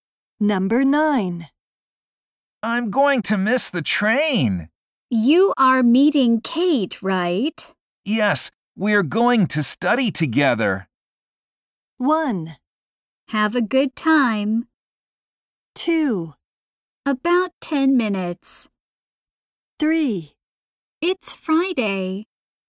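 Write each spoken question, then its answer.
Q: Yes, we're going to study together.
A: 1: Have a good time.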